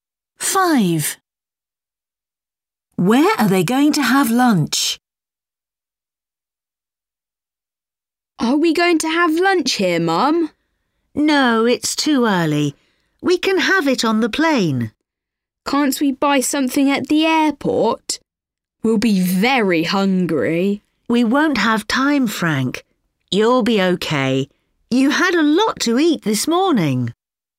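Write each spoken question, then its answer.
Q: Where are they going to have lunch?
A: On the plane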